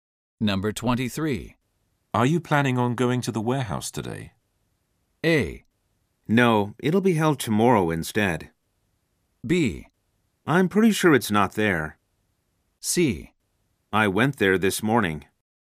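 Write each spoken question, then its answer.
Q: Are you planning on going to the warehouse today?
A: C: I went there this morning.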